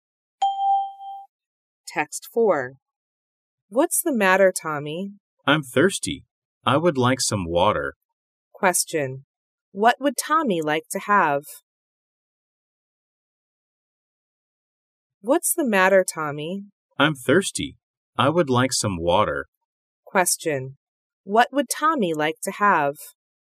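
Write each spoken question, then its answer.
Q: What would Tommy like to have?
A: Some water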